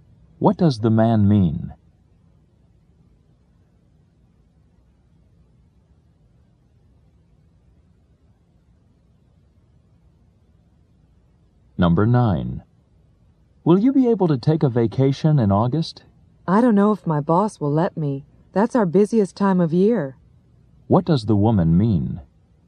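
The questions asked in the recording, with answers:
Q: What does the woman mean?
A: She may not be able to take a vacation in August because it is her busiest time.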